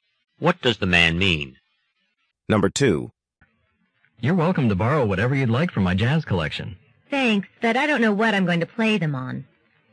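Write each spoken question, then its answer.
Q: What can be inferred about the woman?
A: She has nothing to play the music on.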